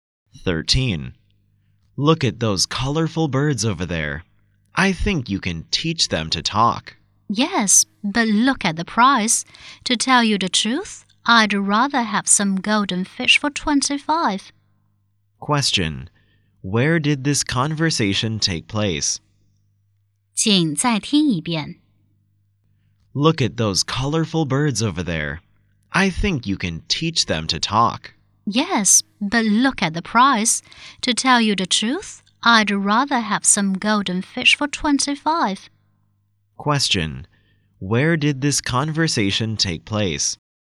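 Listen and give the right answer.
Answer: In a pet shop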